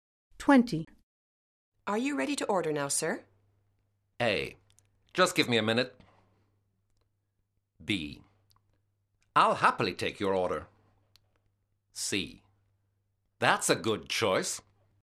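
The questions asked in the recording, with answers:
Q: Are you ready to order now, sir?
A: A: Just give me a minute.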